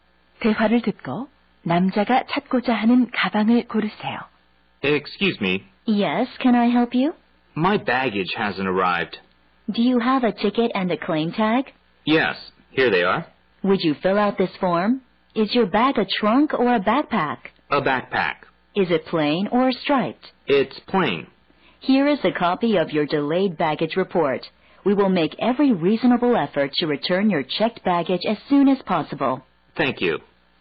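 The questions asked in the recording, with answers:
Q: 대화를 듣고 남자가 찾고자 하는 가방을 고르세요.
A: 무늬 없는 배낭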